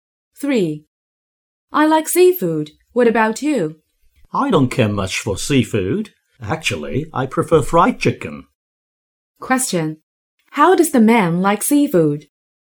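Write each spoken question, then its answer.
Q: How does the man like seafood?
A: He doesn't care much for it; he prefers fried chicken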